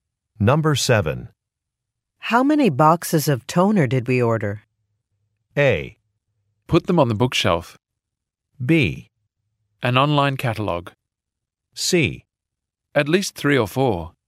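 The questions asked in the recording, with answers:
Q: How many boxes of toner did we order?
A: C: At least 3 or 4.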